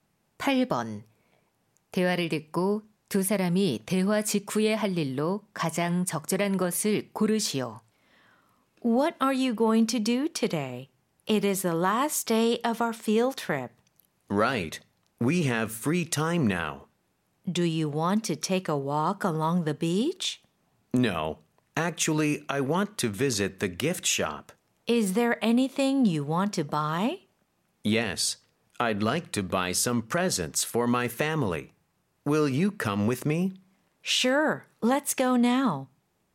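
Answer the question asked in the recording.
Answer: 기념품 가게 방문하기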